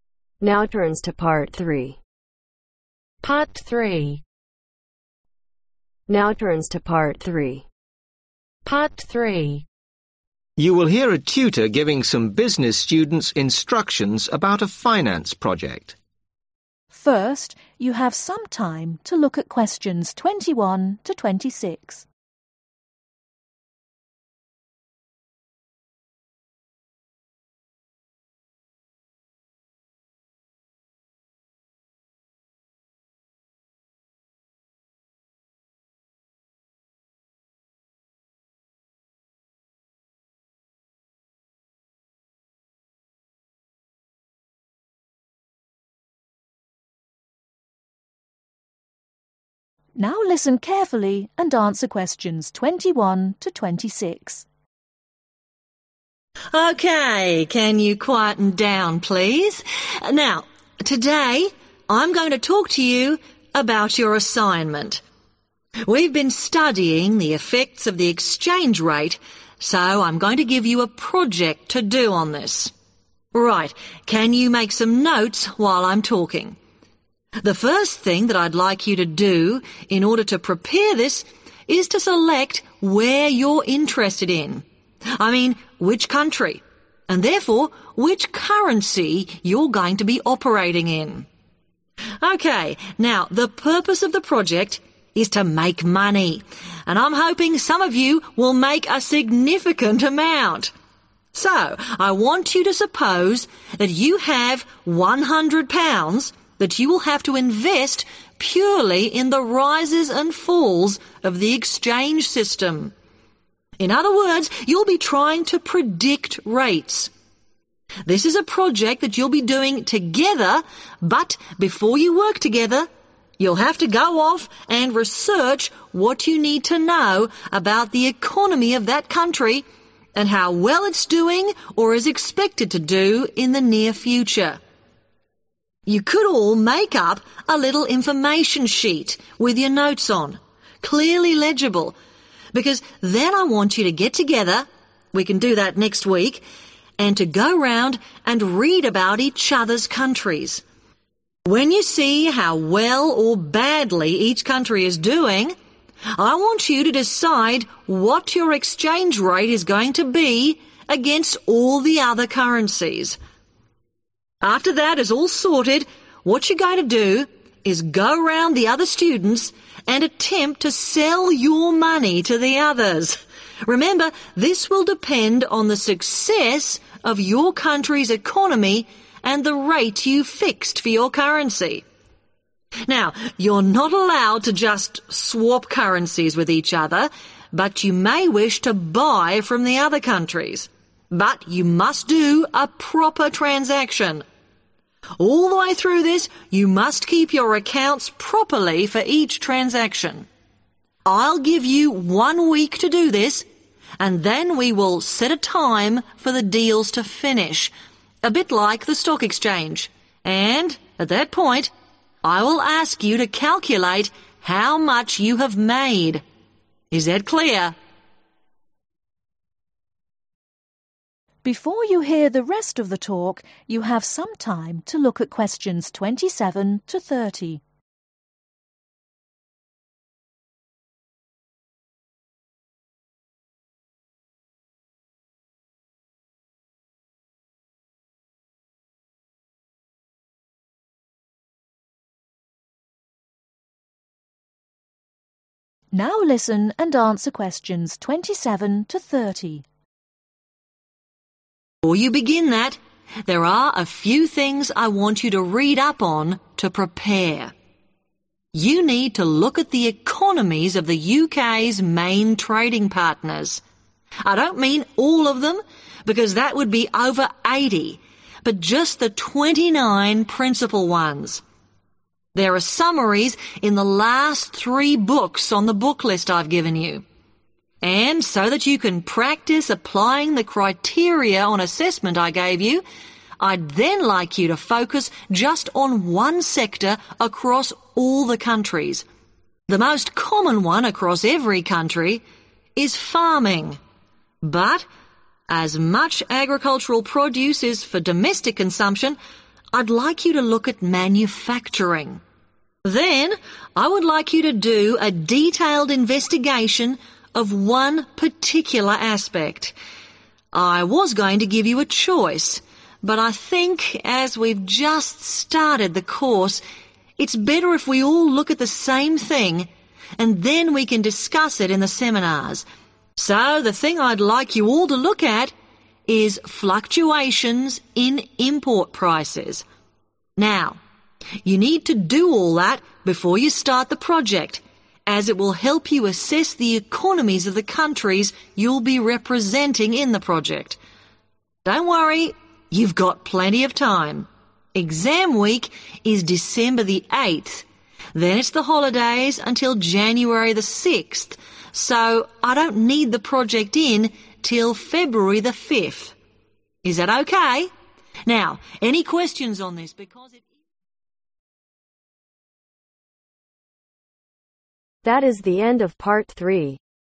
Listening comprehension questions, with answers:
Write ONE WORD ONLY for each answer.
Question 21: (21)............ a currency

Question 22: imagine you need to (22)............ £100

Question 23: (23)............ facts about the state of your country's economy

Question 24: try to (24)............ your currency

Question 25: (25)............ other currency if you want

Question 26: (26)............ your profit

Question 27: How many main trading partners does the UK have ?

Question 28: Which sector does the tutor want students to study ?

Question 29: What does the tutor want students to look at changes in ?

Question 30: When does the tutor want the project completed by ?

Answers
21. Select
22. Invest
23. Research
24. Sell
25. Buy
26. Calculate
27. 29
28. Manufacturing
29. Import prices
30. February 5th